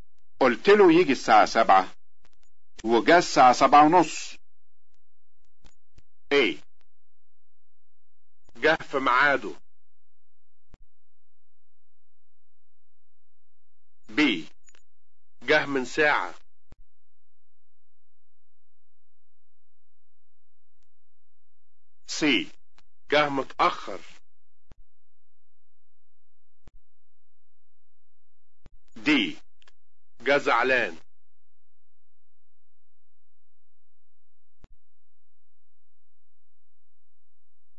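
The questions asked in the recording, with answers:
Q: قلت له يجي الساعة 7 وجا الساعة 7:30.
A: C: جه متأخر.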